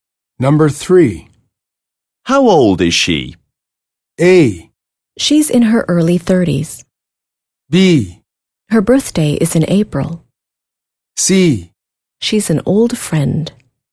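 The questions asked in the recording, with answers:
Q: How old is she?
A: A: She's in her early 30s.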